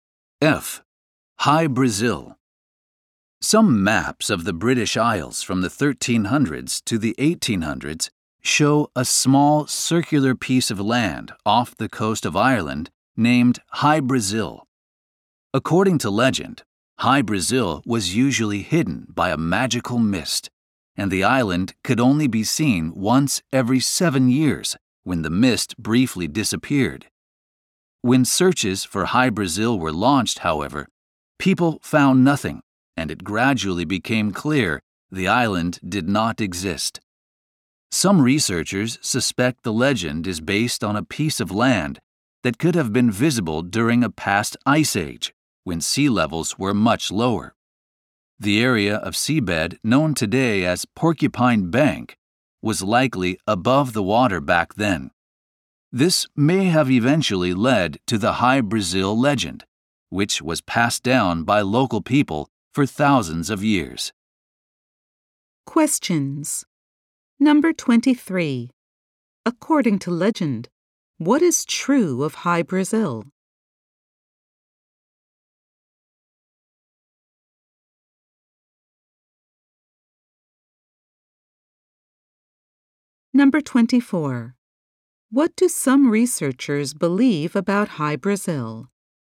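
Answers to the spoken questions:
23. It could only be seen once every 7 years
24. It may be based on land that was visible during an ice age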